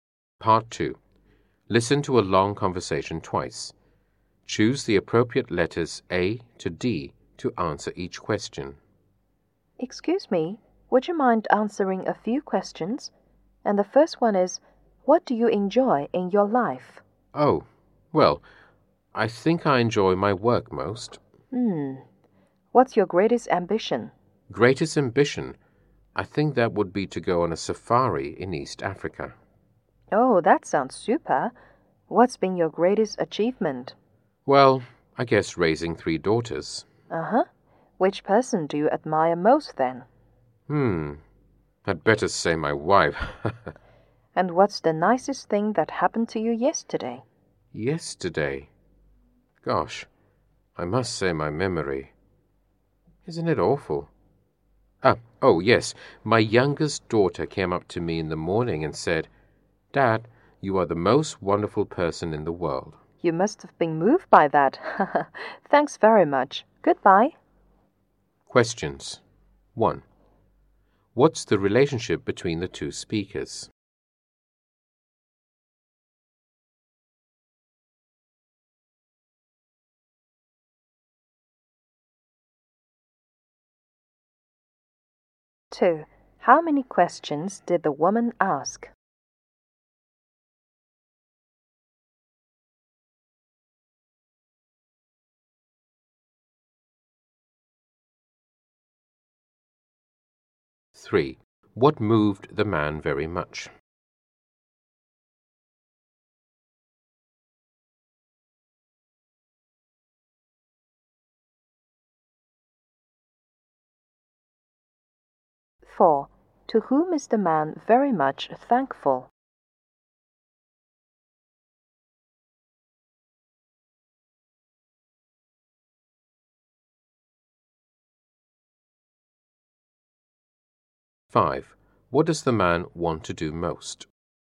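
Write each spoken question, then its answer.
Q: How many questions did the woman ask?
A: Five

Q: What moved the man very much?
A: His youngest daughter saying he is the most wonderful person in the world

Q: What does the man want to do most?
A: Go on a safari in East Africa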